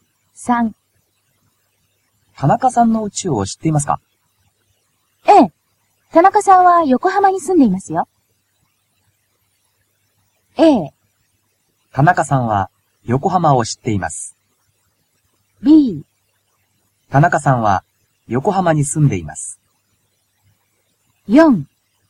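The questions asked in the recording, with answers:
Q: 田中さんの家を知っていますか?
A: B: 田中さんは横浜に住んでいます。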